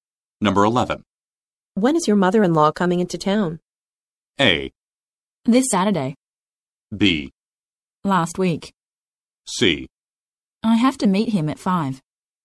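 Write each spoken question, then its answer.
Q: When is your mother-in-law coming into town?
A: A: This Saturday.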